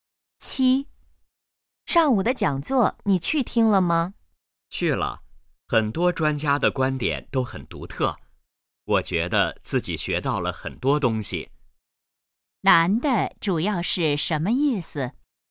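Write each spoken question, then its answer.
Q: 男的主要是什么意思?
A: 讲座很好,他学到了很多东西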